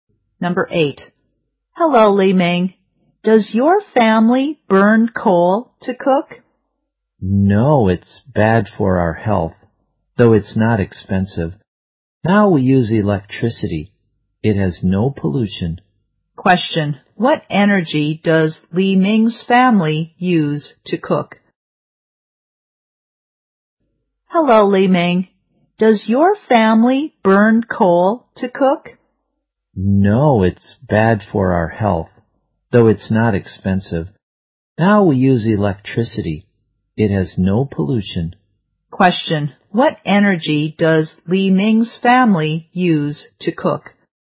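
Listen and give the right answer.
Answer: Electricity.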